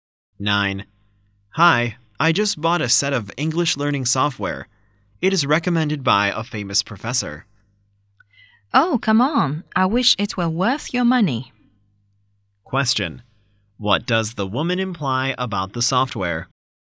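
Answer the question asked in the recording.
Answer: It is not worth the money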